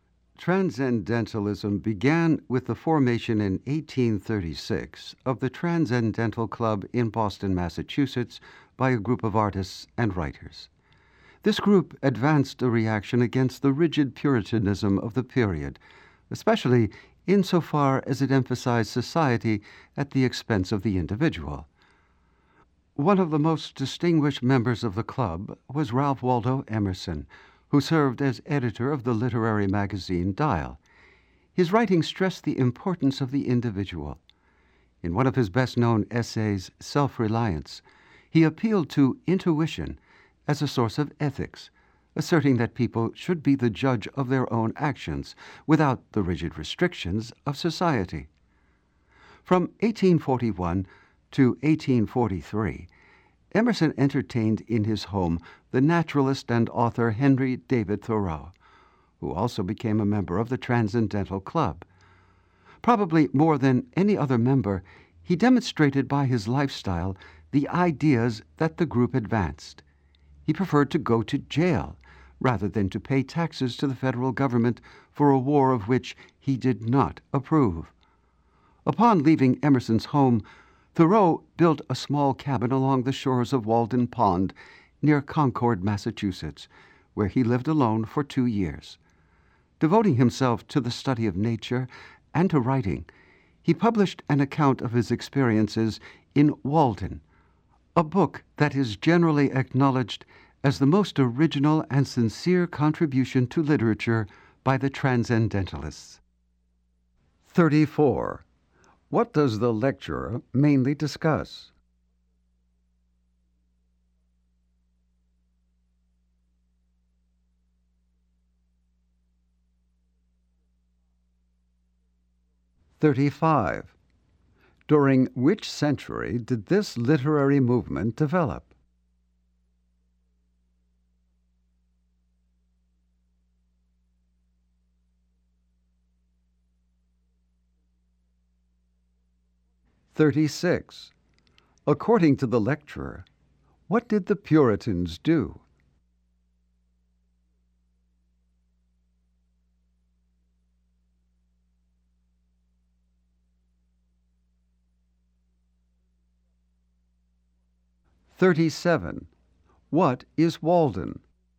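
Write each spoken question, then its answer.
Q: What does the lecturer mainly discuss?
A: Transcendentalism

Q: During which century did this literary movement develop?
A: The 19th century

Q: According to the lecturer, what did the Puritans do?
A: They emphasized society at the expense of the individual

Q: What is Walden?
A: A book by Thoreau about his time living at Walden Pond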